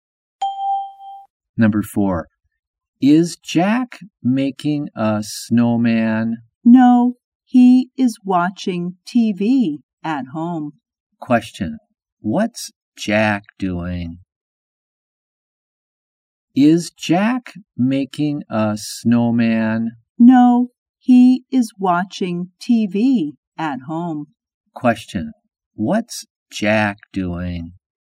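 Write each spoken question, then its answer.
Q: Question, what's Jack doing?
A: Watching TV at home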